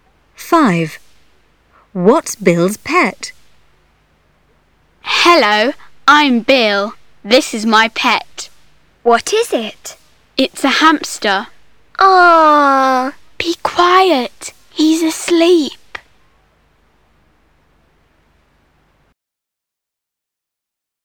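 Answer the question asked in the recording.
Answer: A hamster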